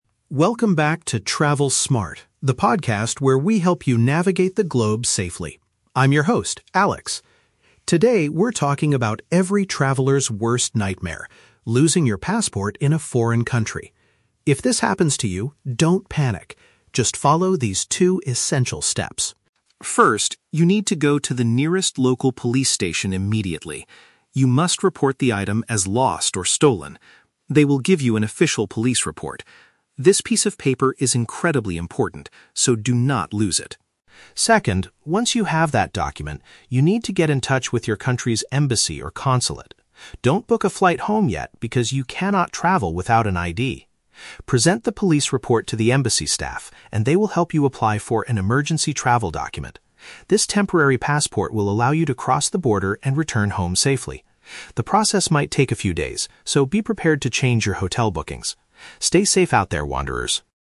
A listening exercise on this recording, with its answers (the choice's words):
Listen to the podcast episode about losing a passport. Choose the correct answer (A, B, or C) for each question.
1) According to the host, what is the very first step you should take?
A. Contact the embassy to report the stolen item.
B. Visit the local authorities to get a specific document.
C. Return to your hotel room to search your bags carefully.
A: Visit the local authorities to get a specific document.

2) Why does the traveler need to visit the embassy?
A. To receive a short-term paper that allows them to travel.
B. To ask the staff to extend their hotel reservations for a few days.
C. To buy a new airplane ticket to fly back to their home country.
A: To receive a short-term paper that allows them to travel.

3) What does the host say about the police report?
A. It costs a lot of money to get it from the station.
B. It will allow you to board the airplane immediately.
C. It is necessary for getting your replacement ID.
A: It is necessary for getting your replacement ID.

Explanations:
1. The host says the first step is to "go to the nearest local police station" to get an "official police report." "Local authorities" is a synonym for the police.
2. The host explains that the embassy will help you apply for an "emergency travel document" or a "temporary passport." Option (A) uses synonyms (short-term paper) to describe this.
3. The host states that you must "present the police report to the embassy staff" so they can help you apply for the emergency document (replacement ID).

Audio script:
Host: Welcome back to "Travel Smart," the podcast where we help you navigate the globe safely. I'm your host, Alex. Today, we're talking about every traveler's worst nightmare: losing your passport in a foreign country. If this happens to you, don't panic. Just follow these two essential steps.
First, you need to go to the nearest local police station immediately. You must report the item as lost or stolen. They will give you an official police report. This piece of paper is incredibly important, so do not lose it.
Second, once you have that document, you need to get in touch with your country's embassy or consulate. Don't book a flight home yet, because you cannot travel without an ID! Present the police report to the embassy staff, and they will help you apply for an emergency travel document. This temporary passport will allow you to cross the border and return home safely. The process might take a few days, so be prepared to change your hotel bookings. Stay safe out there, wanderers!